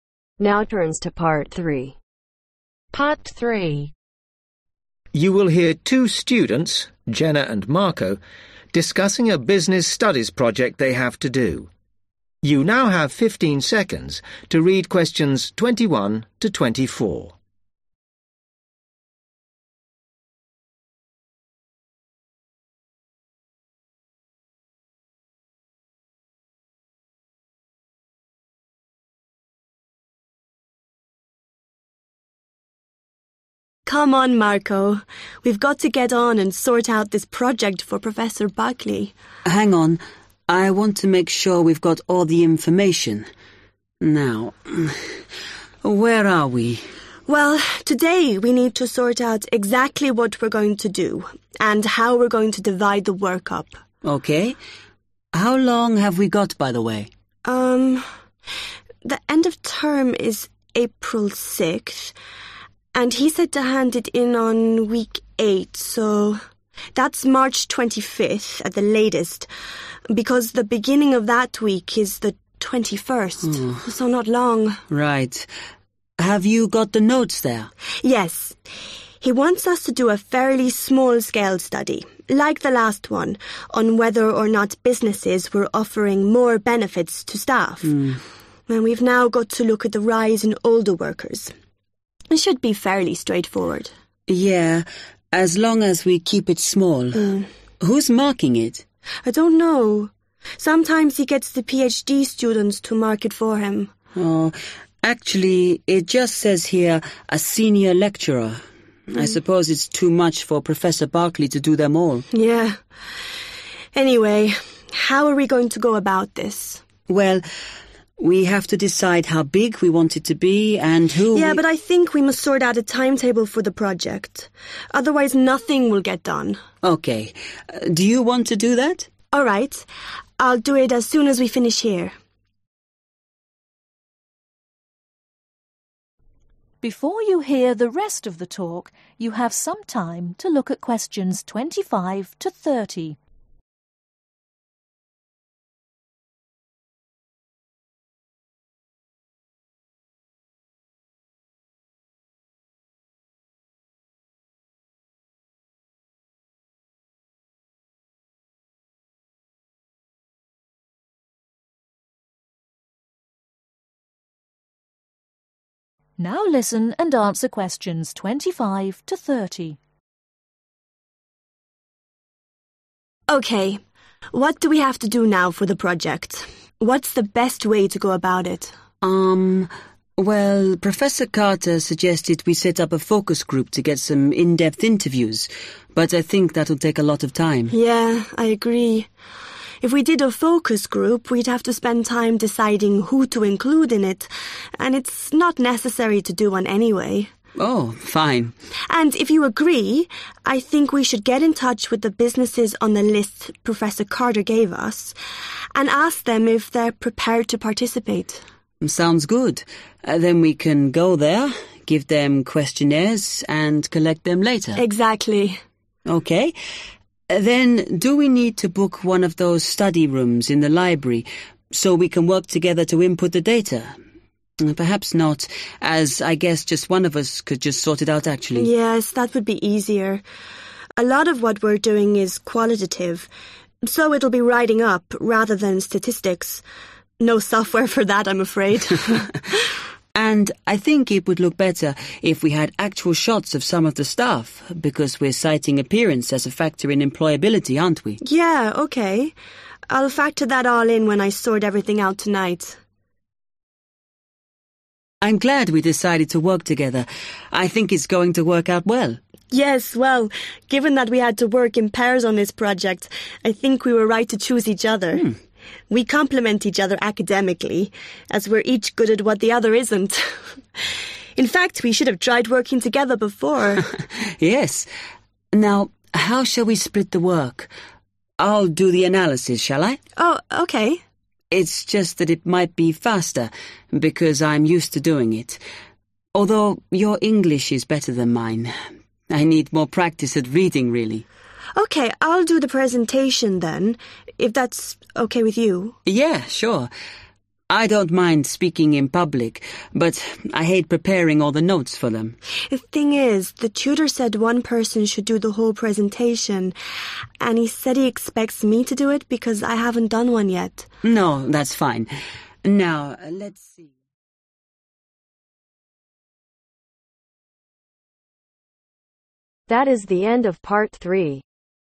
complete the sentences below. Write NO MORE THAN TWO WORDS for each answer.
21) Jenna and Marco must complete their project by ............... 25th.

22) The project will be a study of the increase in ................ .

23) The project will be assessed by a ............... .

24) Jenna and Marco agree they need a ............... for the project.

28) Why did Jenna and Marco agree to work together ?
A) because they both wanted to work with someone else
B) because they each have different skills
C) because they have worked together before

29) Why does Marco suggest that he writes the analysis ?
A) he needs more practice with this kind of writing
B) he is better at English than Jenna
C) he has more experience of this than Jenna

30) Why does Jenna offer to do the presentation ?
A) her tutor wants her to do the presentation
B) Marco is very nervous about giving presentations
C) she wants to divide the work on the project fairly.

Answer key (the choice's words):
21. MARCH
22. OLDER WORKERS
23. SENIOR LECTURER
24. TIMETABLE
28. because they each have different skills
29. he has more experience of this than Jenna
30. her tutor wants her to do the presentation